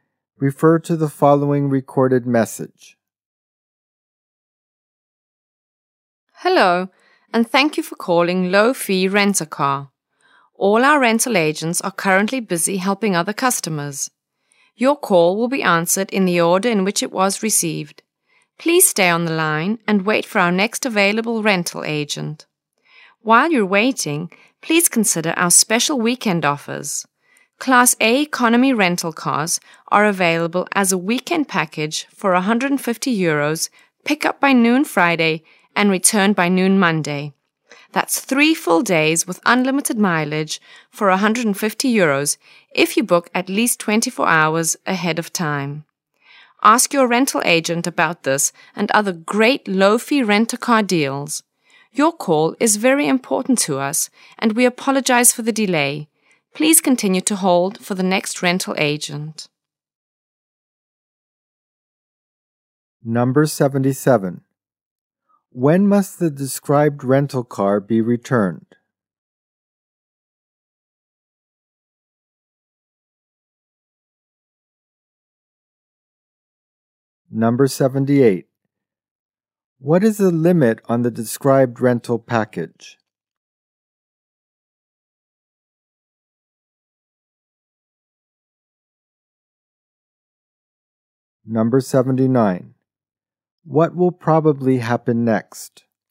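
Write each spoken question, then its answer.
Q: When must the described rental car be returned?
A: By noon Monday

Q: What will probably happen next?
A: The caller will speak with a rental agent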